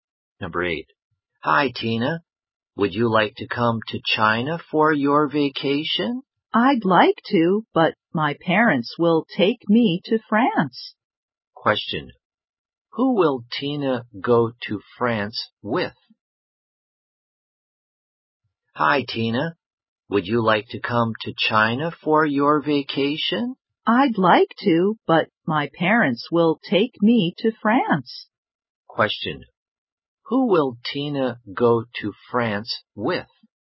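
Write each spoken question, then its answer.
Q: Question. Who will Tina go to France with?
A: Her parents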